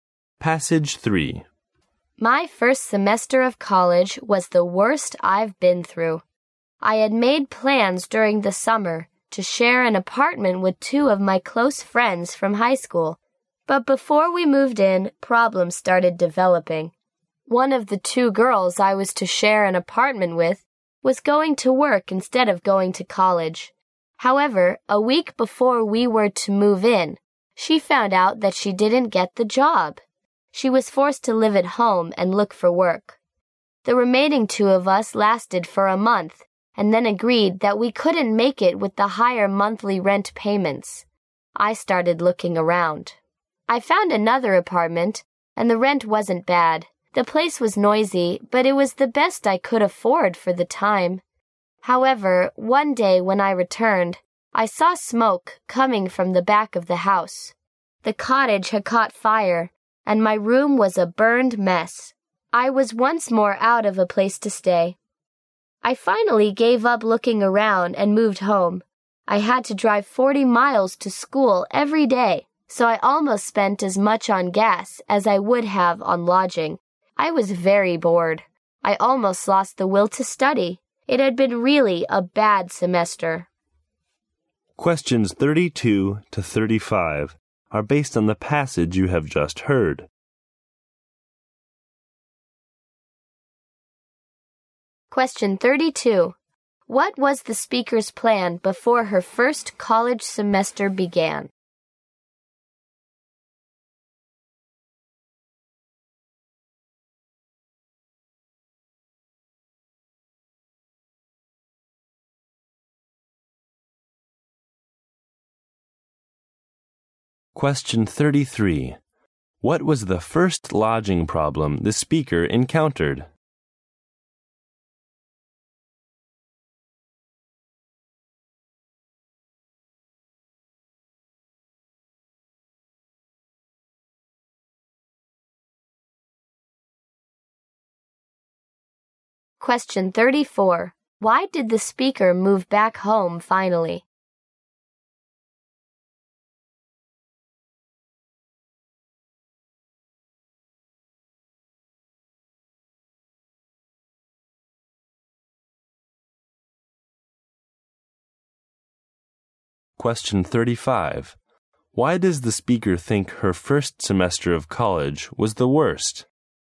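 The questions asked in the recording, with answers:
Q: What was the speaker's plan before her first college semester began?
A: To share an apartment with two close friends from high school

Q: What was the first lodging problem the speaker encountered?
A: One roommate did not get her job and had to live at home, so the rent was too high for the other two

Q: Why did the speaker move back home finally?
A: A fire burned her room in the new place, and she gave up looking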